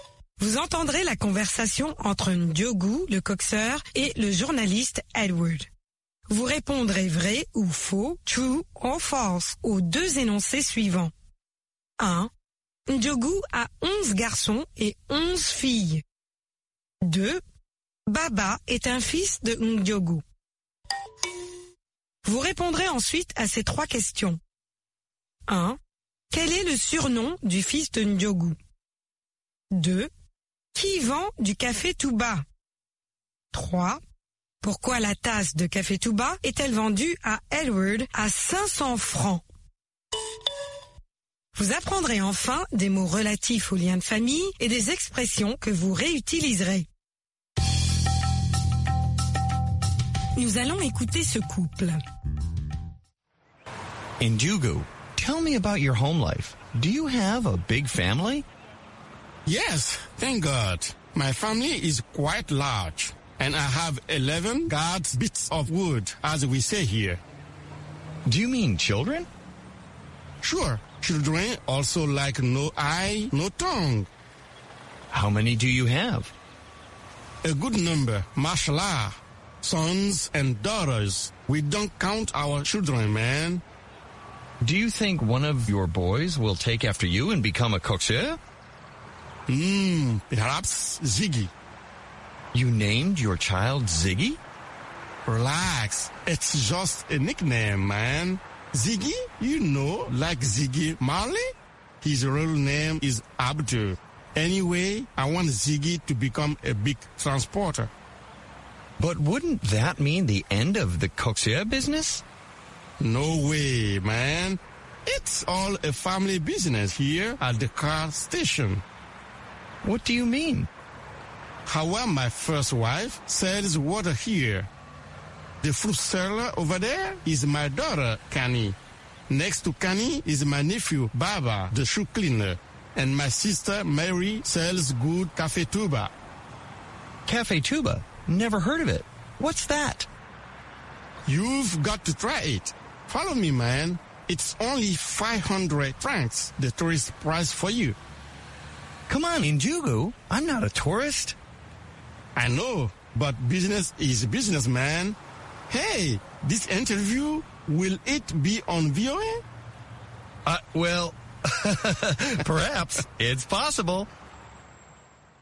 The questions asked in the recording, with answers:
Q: Ndiogou a 11 garçons et 11 filles.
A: L'énoncé 1 est faux.

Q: Baba est un fils de Ndiogou.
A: L'énoncé 2 est faux.

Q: Quel est le surnom du fils de Ndiogou?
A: Zegi.

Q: Qui vend du café tout bas?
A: Marie, la sœur de Ndiogu.

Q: Pourquoi la tasse de café tout bas est-elle vendue à Edward à 500 francs?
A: C'est le prix pour touristes.